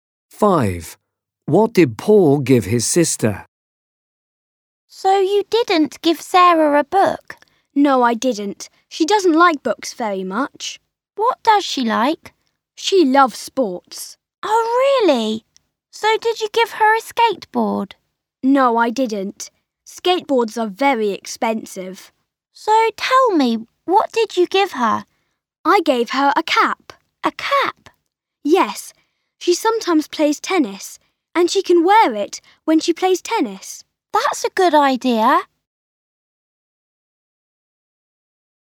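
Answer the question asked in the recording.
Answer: A cap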